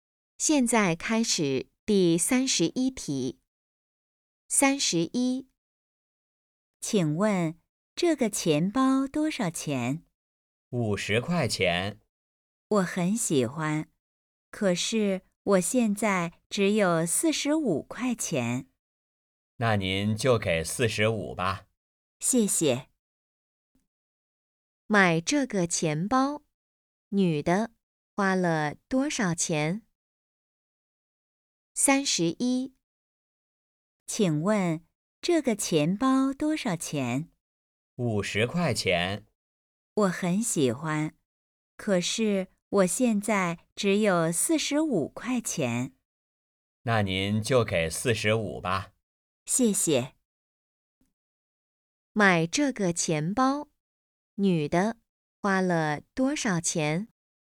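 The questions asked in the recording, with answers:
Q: 买这个钱包,女的花了多少钱?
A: 45块钱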